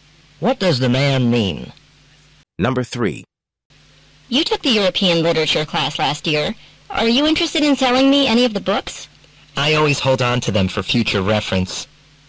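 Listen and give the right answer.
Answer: Keep his books rather than sell them.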